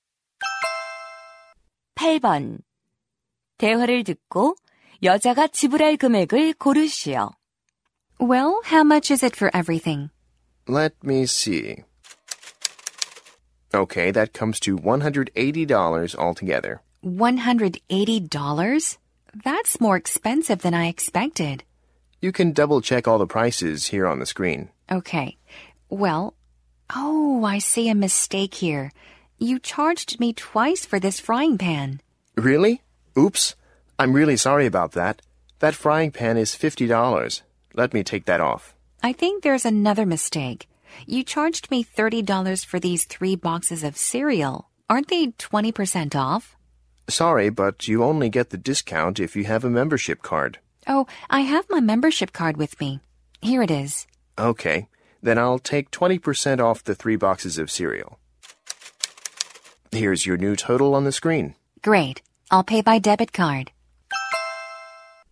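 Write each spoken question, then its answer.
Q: 대화를 듣고 여자가 지불할 금액을 고르시오.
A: $124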